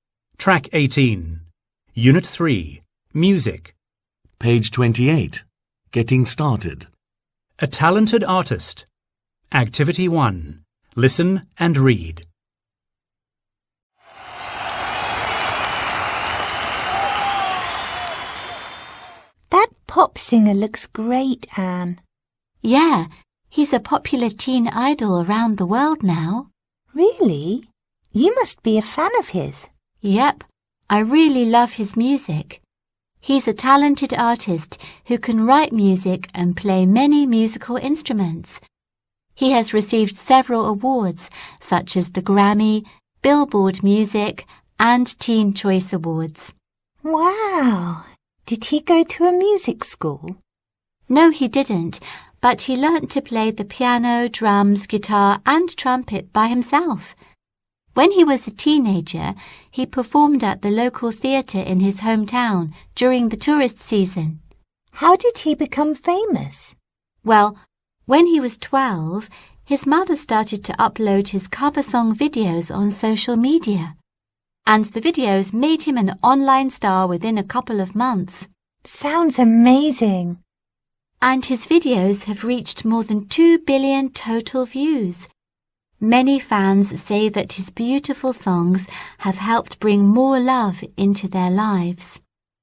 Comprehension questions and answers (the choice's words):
Task: Choose the correct answer.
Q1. The pop singer can ________.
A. sing only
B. write music and play instruments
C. dance and act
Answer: write music and play instruments

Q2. He became famous because ________.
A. his mother posted his videos online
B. he won a Grammy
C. he joined a music school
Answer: his mother posted his videos online

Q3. His videos have over ________ total views.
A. one million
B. two billion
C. three hundred thousand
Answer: two billion

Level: lớp 10